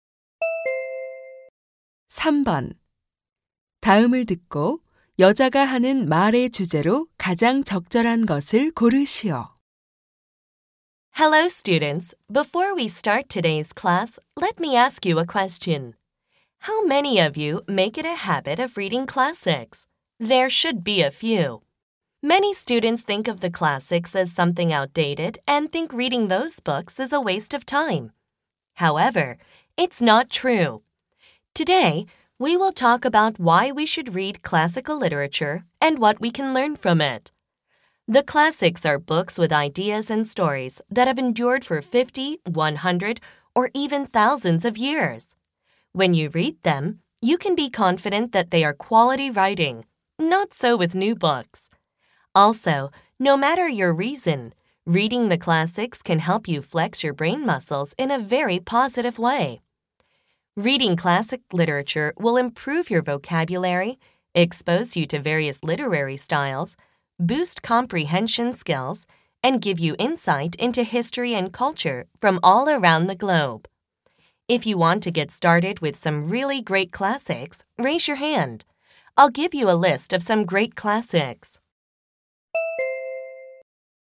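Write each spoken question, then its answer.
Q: 다음을 듣고 여자가 하는 말의 주제로 가장 적절한 것을 고르시오.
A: 고전 문학을 읽어야 하는 이유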